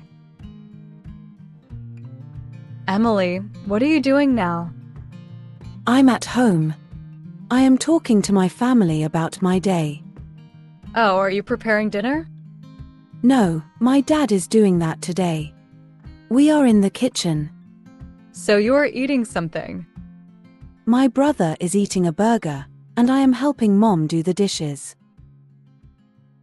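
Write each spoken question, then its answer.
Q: What is Emily doing?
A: Helping her mom do the dishes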